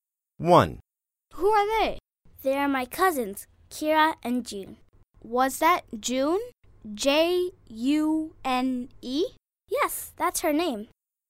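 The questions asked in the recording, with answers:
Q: Who are they?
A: Her cousins, Kira and June (J-U-N-E)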